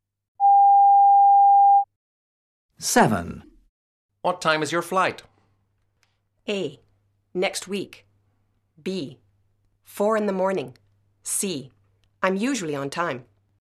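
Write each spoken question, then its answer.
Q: What time is your flight?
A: B: 4 in the morning.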